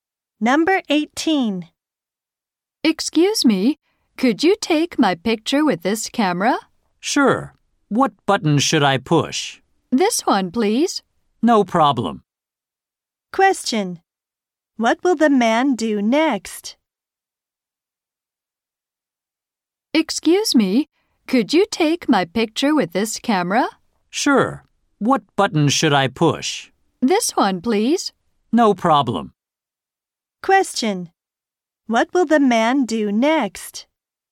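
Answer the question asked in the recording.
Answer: Take the woman's picture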